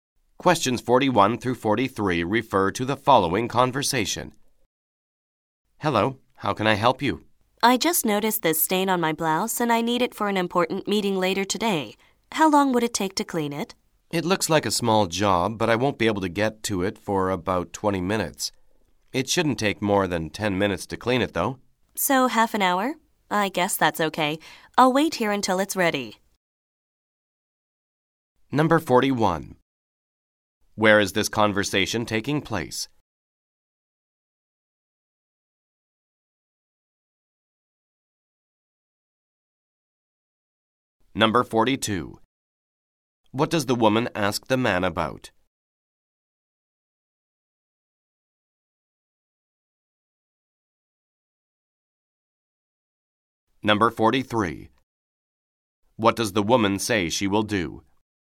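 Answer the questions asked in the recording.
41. At a dry cleaner's
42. How long it will take to clean her blouse
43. Wait there until the blouse is ready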